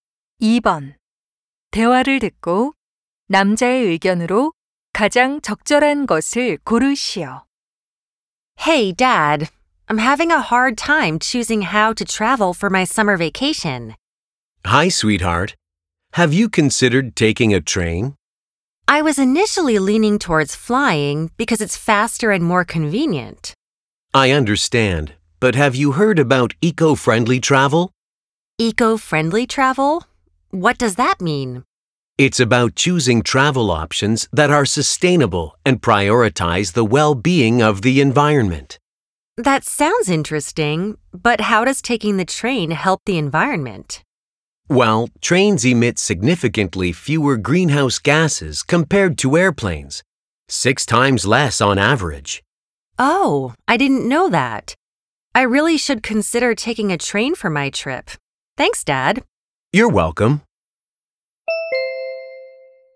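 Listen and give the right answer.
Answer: 여행할 때 환경친화적인 기차를 이용하는 것이 좋다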